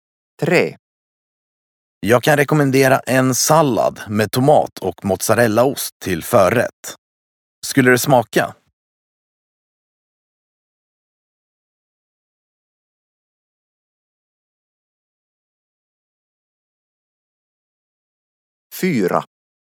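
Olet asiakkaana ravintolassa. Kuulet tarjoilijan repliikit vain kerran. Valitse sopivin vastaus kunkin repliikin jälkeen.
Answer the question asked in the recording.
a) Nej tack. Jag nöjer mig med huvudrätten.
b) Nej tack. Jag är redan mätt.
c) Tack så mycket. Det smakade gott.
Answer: a) Nej tack. Jag nöjer mig med huvudrätten.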